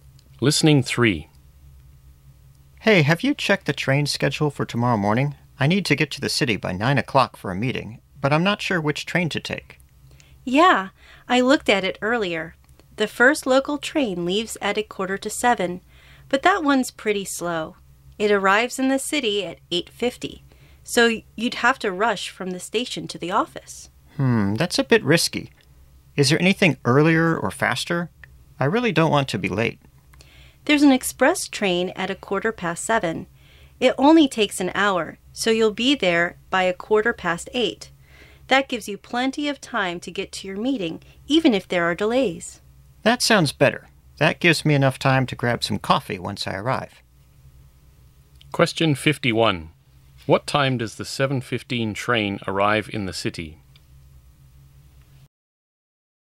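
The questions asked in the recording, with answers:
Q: What time does the 7:15 train arrive in the city?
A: 8:15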